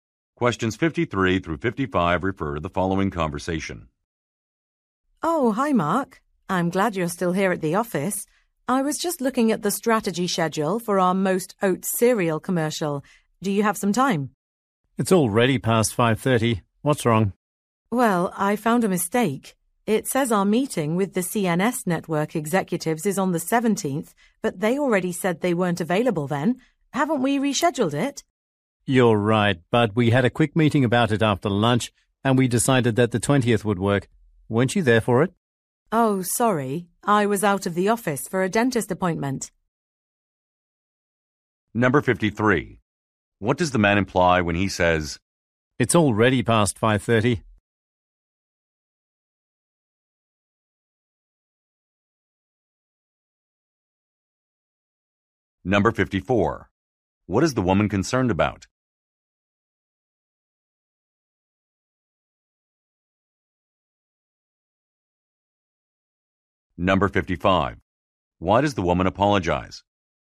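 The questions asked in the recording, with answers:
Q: What is the woman concerned about?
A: A mistake in the meeting date on the schedule

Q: Why does the woman apologize?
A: She missed the meeting because of a dentist appointment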